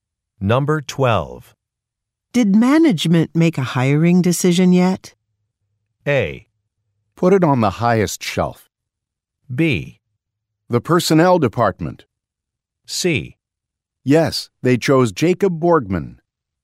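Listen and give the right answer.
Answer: C: Yes, they chose Jacob Borgman.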